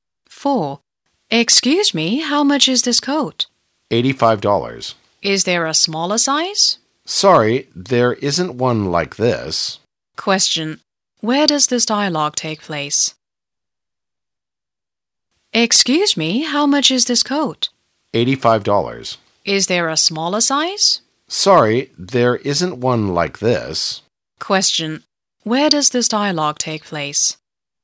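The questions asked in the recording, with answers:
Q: Where does this dialogue take place?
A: In a clothes shop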